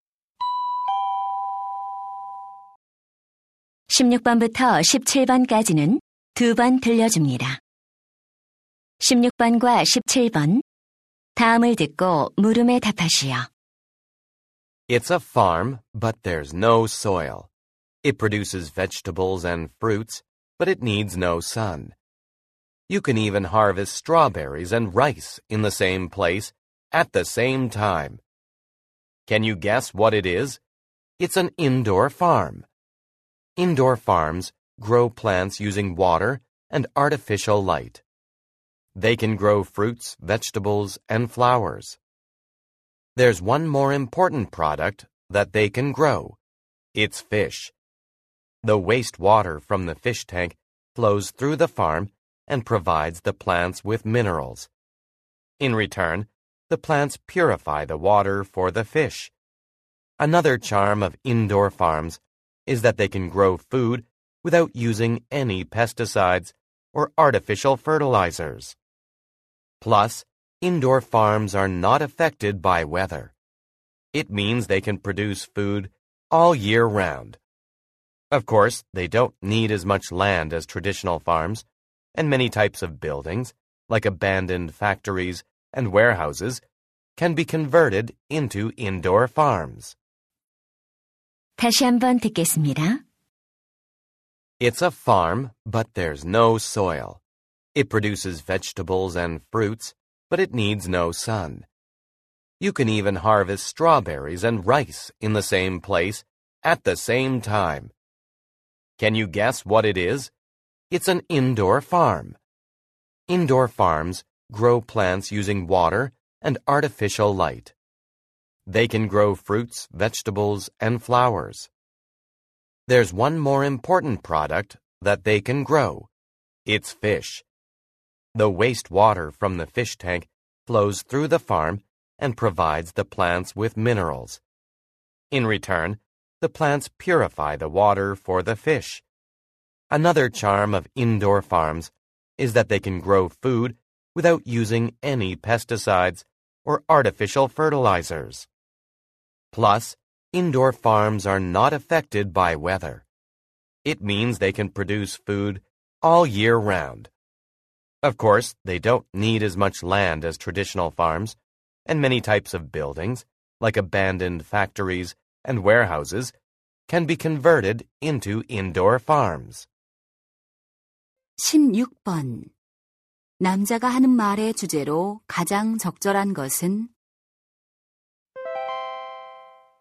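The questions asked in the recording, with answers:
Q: 남자가 하는 말의 주제로 가장 적절한 것은?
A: 실내 농장과 그 장점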